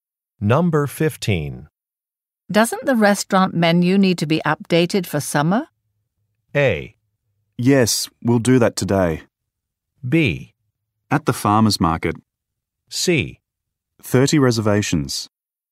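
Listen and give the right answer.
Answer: A: Yes, we'll do that today.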